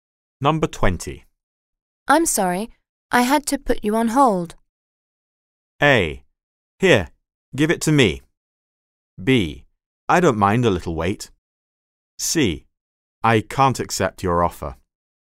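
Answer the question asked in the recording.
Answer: B: I don't mind a little wait.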